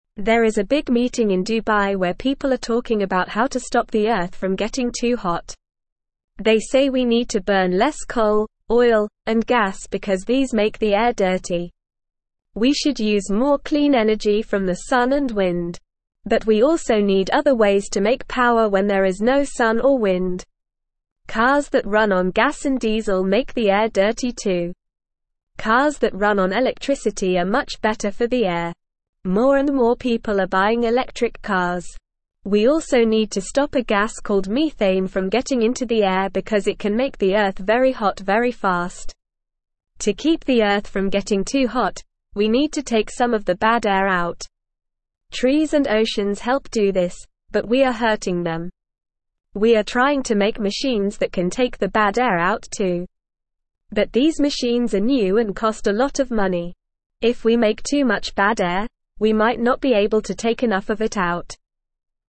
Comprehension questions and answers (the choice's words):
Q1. There is a big meeting in Dubai where people are talking about how to (1)______ the Earth from getting too hot.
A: stop

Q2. They say we need to burn less coal, oil, and gas because these make the air (2)______.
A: dirty

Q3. We should use more (3)______ energy from the sun and wind.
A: clean

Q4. But we also need other ways to make (4)______ when there is no sun or wind.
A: power

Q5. (5)______ that run on gas and diesel make the air dirty too.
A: Cars

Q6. Cars that run on electricity are much (6)______ for the air.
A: better

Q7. We also need to stop a gas called methane from (7)______ into the air because it can (8)______ the Earth very hot very fast.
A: getting

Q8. We also need to stop a gas called methane from (7)______ into the air because it can (8)______ the Earth very hot very fast.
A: make

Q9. To (9)______ the Earth from getting too hot, we need to take some of the bad air out.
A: keep

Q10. We are (10)______ to make machines that can (11)______ the bad air out too.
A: trying

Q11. We are (10)______ to make machines that can (11)______ the bad air out too.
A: take

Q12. If we make too much bad air, we might not be able to take (12)______ of it out.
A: enough

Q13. What are people discussing at the meeting in Dubai?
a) How to make cars run faster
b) How to build more coal power plants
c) How to stop the Earth from getting too hot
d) How to use more gas and oil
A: How to stop the Earth from getting too hot

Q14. Why do people want to burn less coal, oil, and gas?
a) Because they make the air clean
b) Because they are cheap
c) Because they make the air dirty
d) Because they are easy to find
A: Because they make the air dirty

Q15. What kind of cars are better for the air?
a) Cars that run on gas and diesel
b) Cars that run on electricity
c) Cars that run on coal and oil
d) Cars that run on wind and sun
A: Cars that run on electricity

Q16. What helps to take the bad air out and keep the Earth from getting too hot?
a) Cars and machines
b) Gas and diesel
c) Coal and oil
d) Trees and oceans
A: Trees and oceans

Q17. Why are machines that take the bad air out expensive?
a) Because they are old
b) Because they are new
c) Because they are small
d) Because they are easy to make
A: Because they are new

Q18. What might happen if we make too much bad air?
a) We might not be able to take enough of it out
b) We might be able to take all of it out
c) We might not need to take any of it out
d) We might not want to take any of it out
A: We might not be able to take enough of it out

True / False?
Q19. Methane is a gas that can make the Earth very hot very fast, so we need to stop it from getting into the air.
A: True

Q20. Trees and oceans help take the bad air out and keep the Earth from getting too hot.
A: True

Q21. Burning less coal, oil, and gas can help make the air cleaner.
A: True

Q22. Electric cars are not better for the air than cars that run on gas and diesel.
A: False

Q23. People in Dubai are having a big meeting to talk about how to stop the Earth from getting too hot.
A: True

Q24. Machines are not being made to take the bad air out, and they are not new and expensive.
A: False

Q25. Using clean energy from the sun and wind is not a good idea.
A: False

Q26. Less and less people are buying electric cars.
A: False

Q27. What are people talking about at the big meeting in Dubai?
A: They are talking about how to stop the Earth from getting too hot.

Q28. Why do we need to burn less coal, oil, and gas?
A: We need to burn less coal, oil, and gas because they make the air dirty.

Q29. Why are cars that run on electricity better for the air?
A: Cars that run on electricity are better for the air because they don't make it dirty like cars that run on gas and diesel.

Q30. How do trees and oceans help keep the Earth from getting too hot?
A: Trees and oceans help keep the Earth from getting too hot by taking some of the bad air out.

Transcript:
There is a big meeting in Dubai where people are talking about how to stop the Earth from getting too hot. They say we need to burn less coal, oil, and gas because these make the air dirty. We should use more clean energy from the sun and wind. But we also need other ways to make power when there is no sun or wind.
Cars that run on gas and diesel make the air dirty too. Cars that run on electricity are much better for the air. More and more people are buying electric cars. We also need to stop a gas called methane from getting into the air because it can make the Earth very hot very fast.
To keep the Earth from getting too hot, we need to take some of the bad air out. Trees and oceans help do this, but we are hurting them. We are trying to make machines that can take the bad air out too. But these machines are new and cost a lot of money. If we make too much bad air, we might not be able to take enough of it out.

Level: Level 2